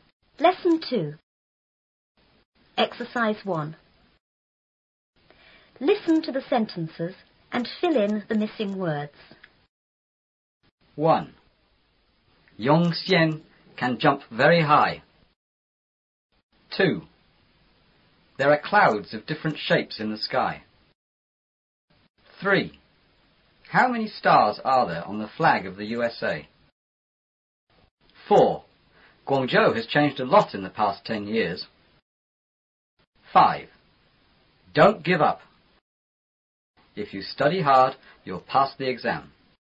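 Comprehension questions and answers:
1.Listen to the sentences and fill in the missing words.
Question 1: Yongxian can___very___.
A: jump; high

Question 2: There are___of different___in the sky.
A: clouds; shapes

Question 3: How many___are there on the flag of the USA?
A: stars

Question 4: Guangzhou___ ___a lot in the past ten years.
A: has changed

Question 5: Don't___ ___!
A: give up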